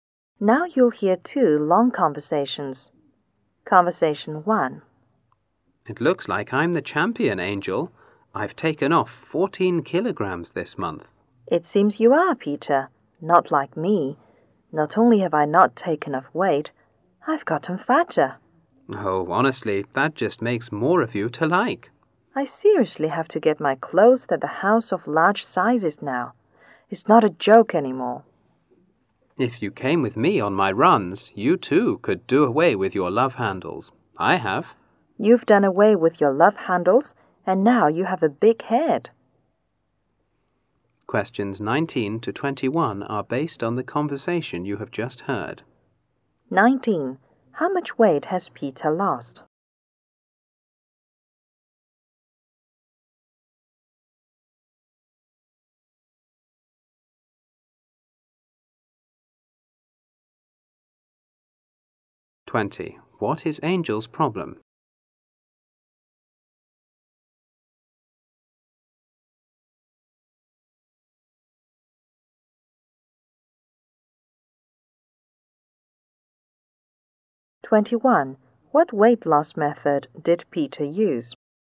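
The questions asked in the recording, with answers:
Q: How much weight has Peter lost?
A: 14 kilograms

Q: What is Angel's problem?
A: She has gained weight

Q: What weight loss method did Peter use?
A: Running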